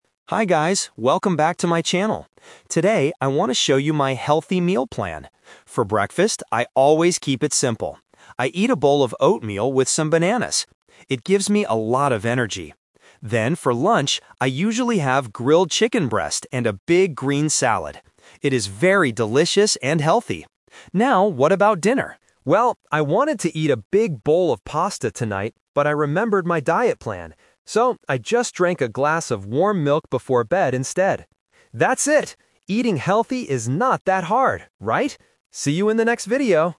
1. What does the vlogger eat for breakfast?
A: Oatmeal and bananas.

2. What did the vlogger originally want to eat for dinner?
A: A bowl of pasta.

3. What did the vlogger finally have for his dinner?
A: Warm milk.

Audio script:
Vlogger: Hi guys, welcome back to my channel! Today, I want to show you my healthy meal plan. For breakfast, I always keep it simple. I eat a bowl of oatmeal with some bananas. It gives me a lot of energy. Then, for lunch, I usually have grilled chicken breast and a big green salad. It is very delicious and healthy. Now, what about dinner? Well, I wanted to eat a big bowl of pasta tonight, but I remembered my diet plan. So, I just drank a glass of warm milk before bed instead. That's it! Eating healthy is not that hard, right? See you in the next video!

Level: A2